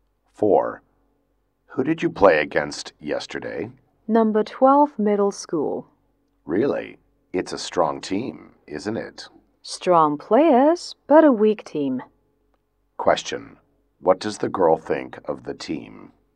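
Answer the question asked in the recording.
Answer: It has strong players but is a weak team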